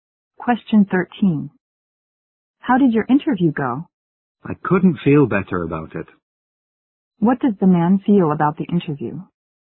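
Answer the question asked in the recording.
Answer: It went very well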